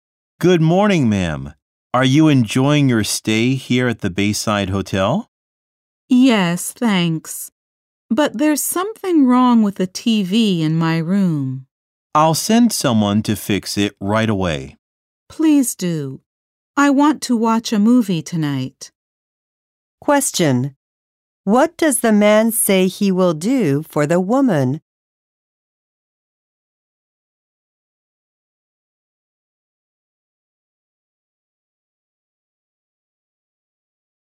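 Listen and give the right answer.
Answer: Send someone to fix her TV.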